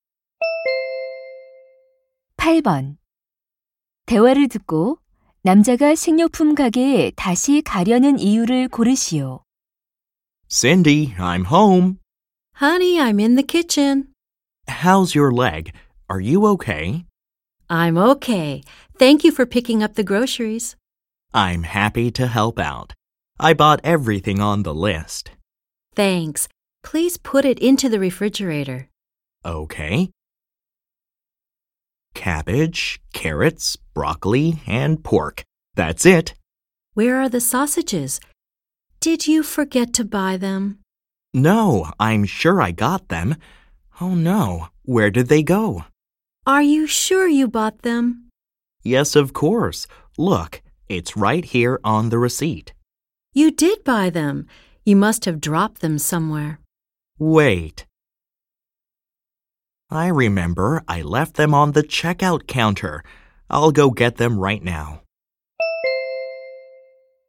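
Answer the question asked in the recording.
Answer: 계산대에 두고 온 소시지를 가져오려고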